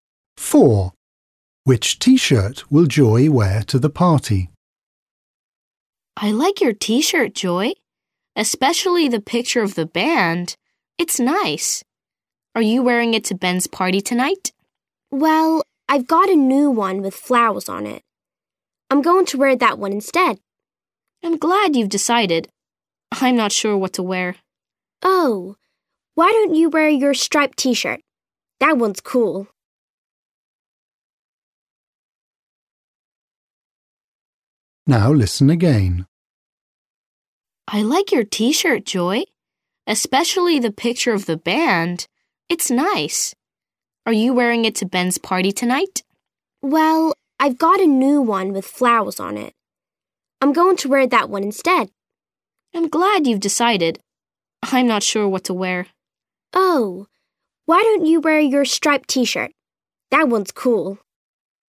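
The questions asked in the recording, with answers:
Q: Which T-shirt will Joy wear to the party?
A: the new one with flowers on it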